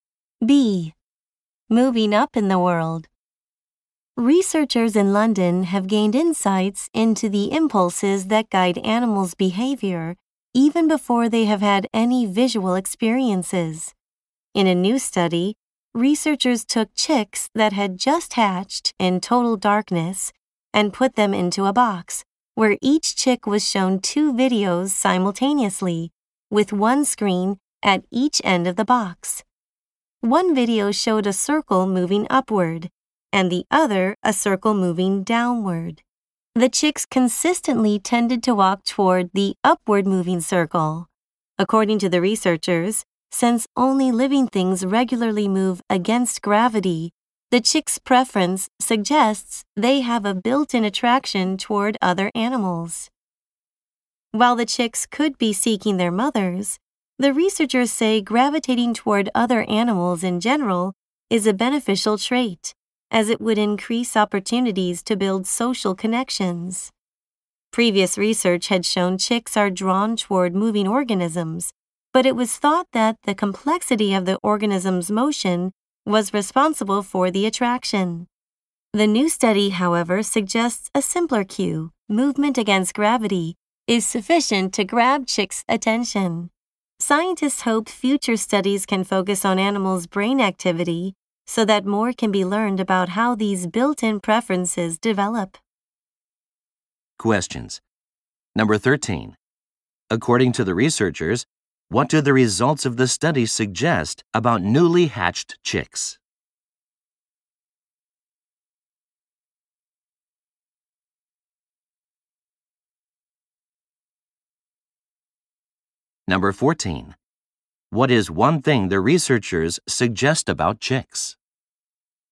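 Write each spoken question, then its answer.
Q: According to the researchers, what do the results of the study suggest about newly hatched chicks?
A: They have a built-in attraction toward other animals.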